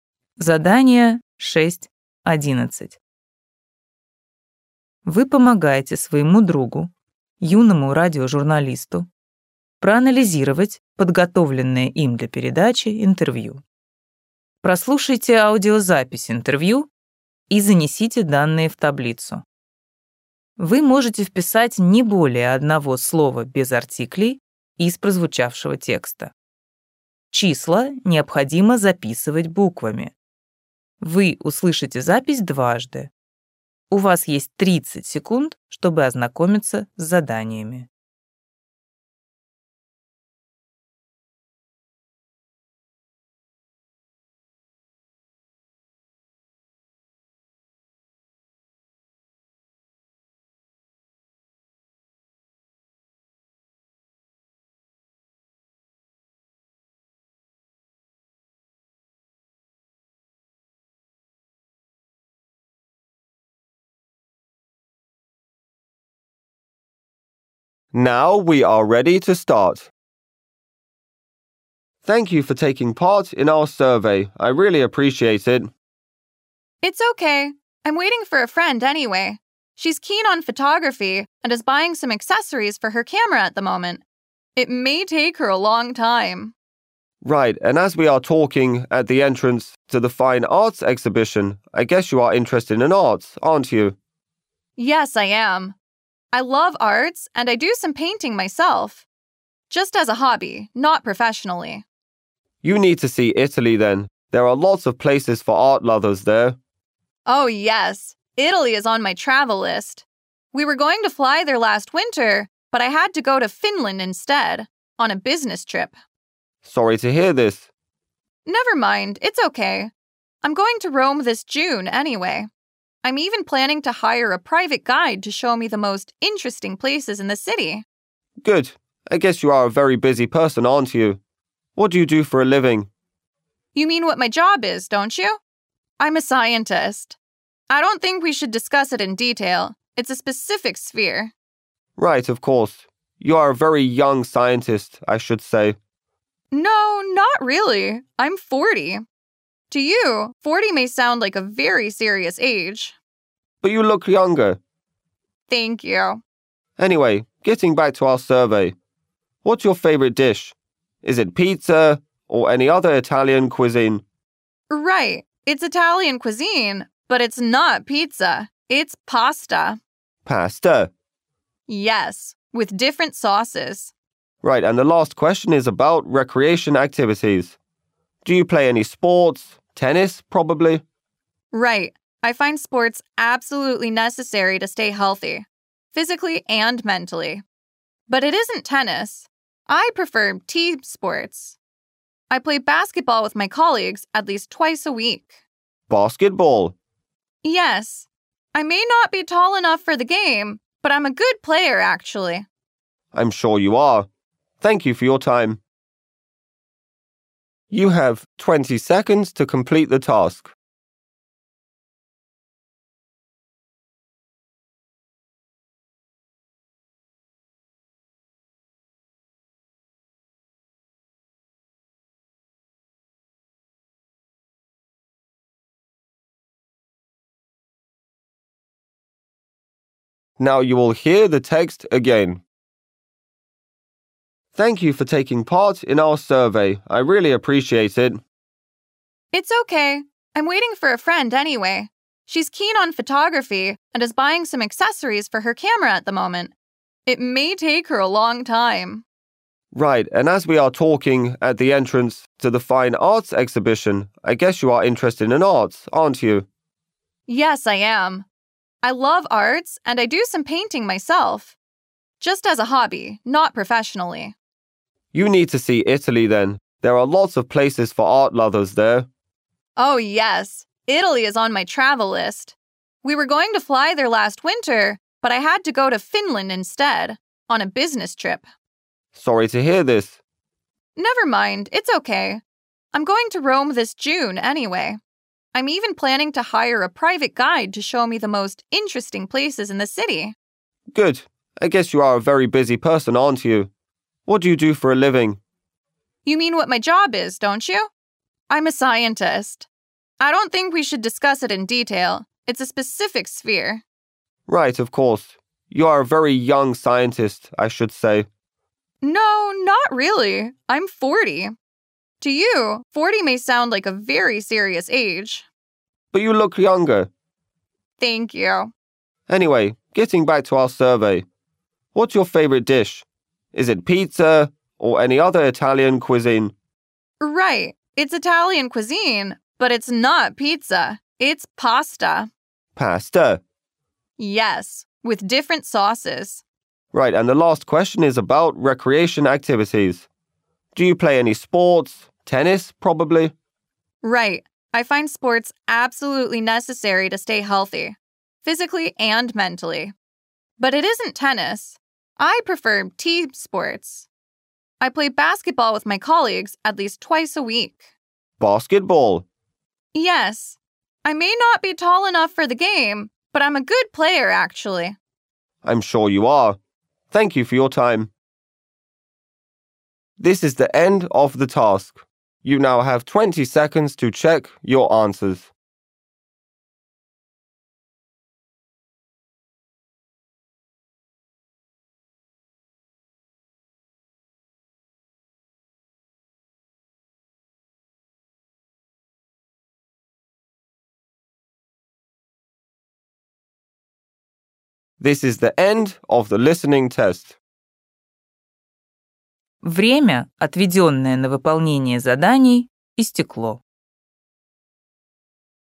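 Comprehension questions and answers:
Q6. Hobby ___________________________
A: painting

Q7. The country he/she wants to visit ___________________________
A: Italy

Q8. Current job ___________________________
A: scientist

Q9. Age of the respondent ___________________ years old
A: forty

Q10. Favourite dish ___________________________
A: pasta

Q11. Regular sports activity ___________________________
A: basketball

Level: ОГЭ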